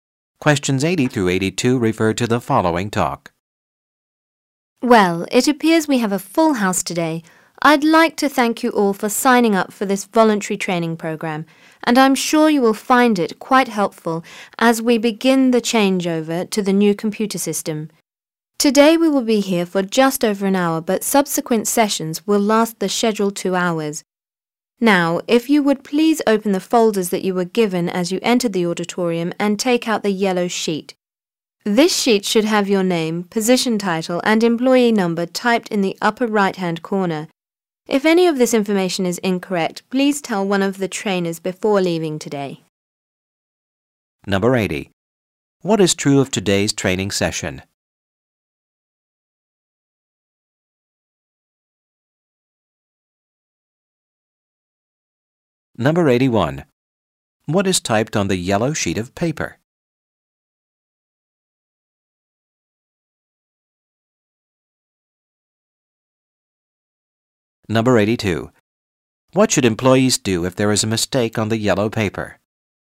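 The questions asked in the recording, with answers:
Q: What is typed on the yellow sheet of paper?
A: Name, position title and employee number

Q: What should employees do if there is a mistake on the yellow paper?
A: Tell one of the trainers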